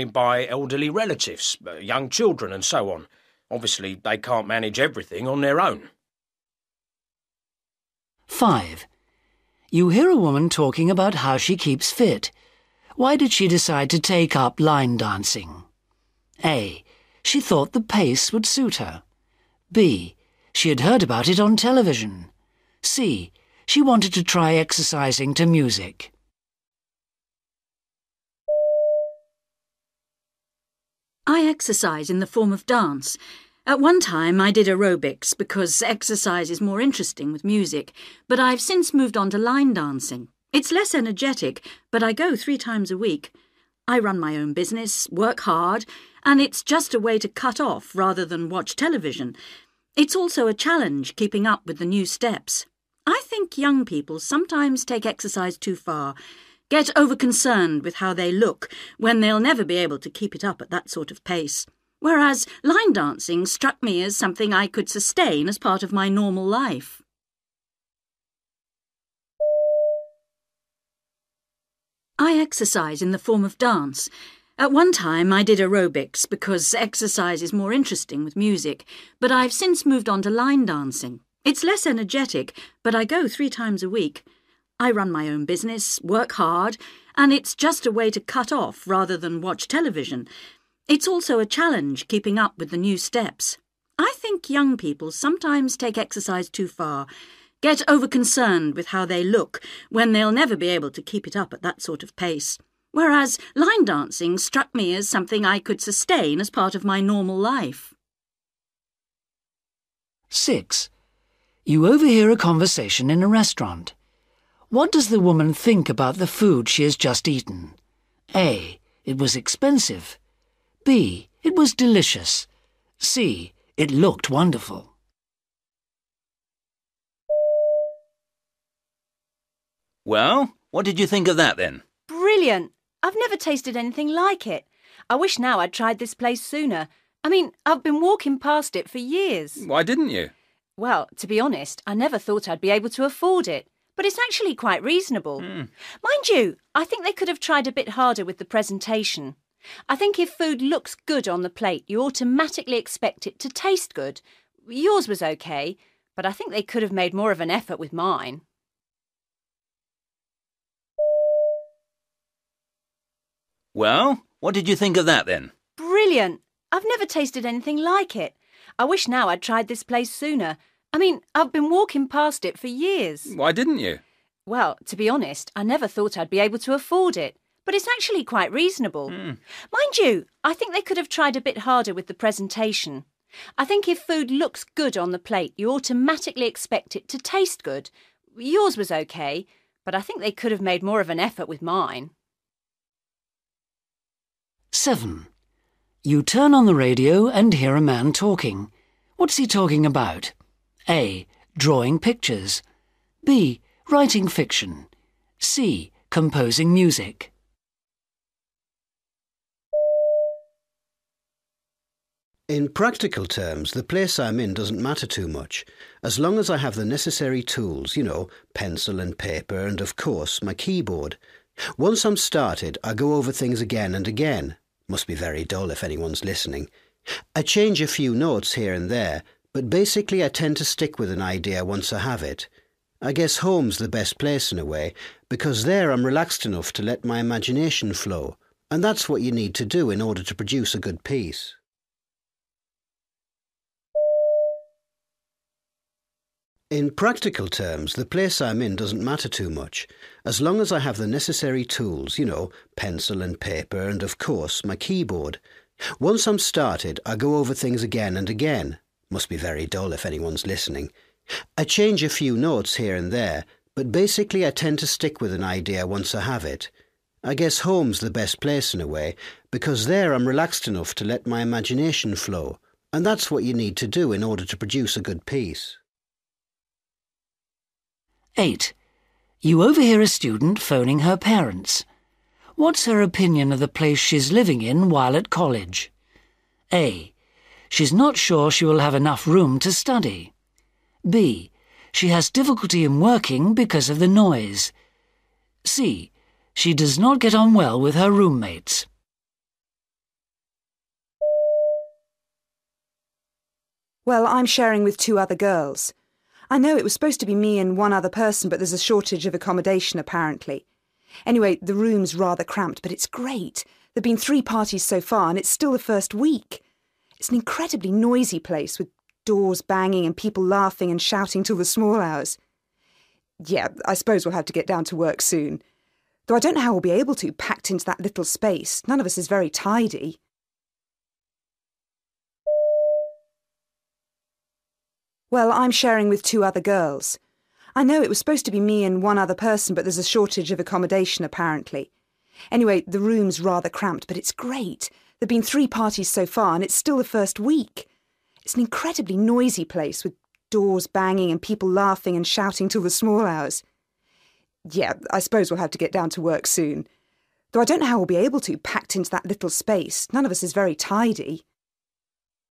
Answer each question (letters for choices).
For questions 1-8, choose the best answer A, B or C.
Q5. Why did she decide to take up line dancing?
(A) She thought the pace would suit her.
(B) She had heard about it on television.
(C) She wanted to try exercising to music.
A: A

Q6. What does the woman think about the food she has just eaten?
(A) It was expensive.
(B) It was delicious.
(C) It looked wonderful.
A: B

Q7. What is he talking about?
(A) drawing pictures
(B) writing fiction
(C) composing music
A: C

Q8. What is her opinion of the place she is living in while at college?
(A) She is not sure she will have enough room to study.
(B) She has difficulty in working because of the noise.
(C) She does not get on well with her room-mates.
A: A